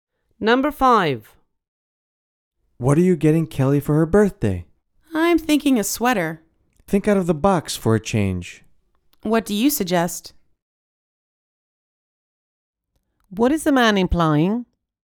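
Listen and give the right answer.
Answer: She should get Kelly a more original gift than a sweater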